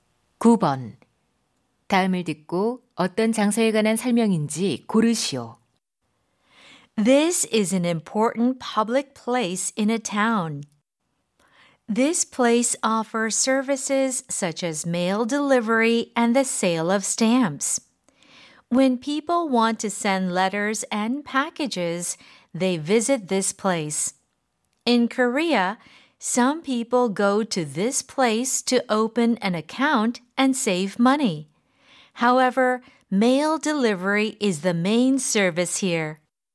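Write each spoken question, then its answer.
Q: 다음을 듣고 어떤 장소에 관한 설명인지 고르시오.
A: 우체국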